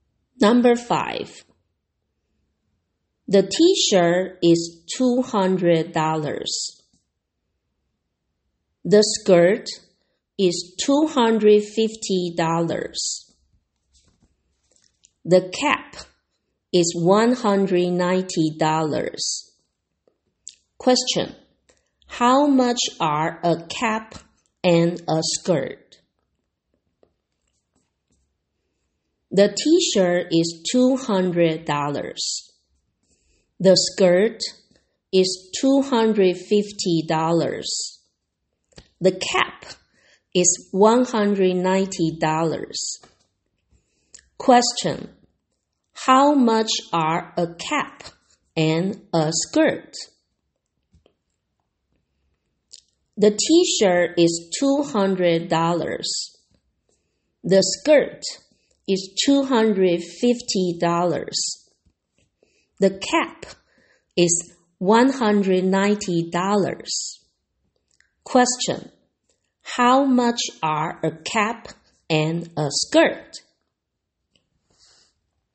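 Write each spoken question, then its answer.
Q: How much are a cap and a skirt?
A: $440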